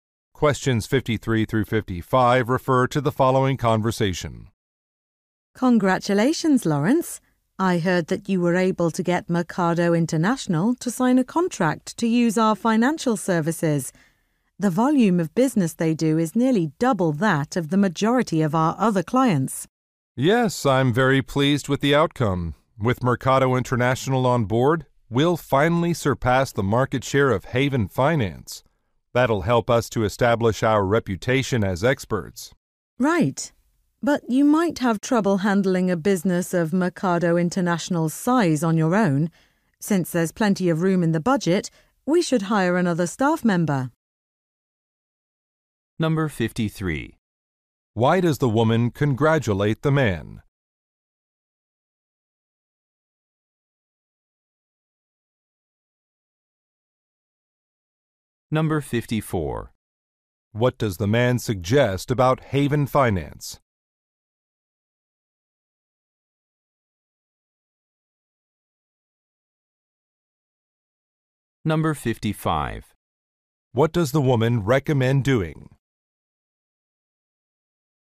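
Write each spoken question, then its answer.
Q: Why does the woman congratulate the man?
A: He signed a contract with a major client

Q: What does the man suggest about Haven Finance?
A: It is a competitor with a larger market share

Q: What does the woman recommend doing?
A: Hiring another staff member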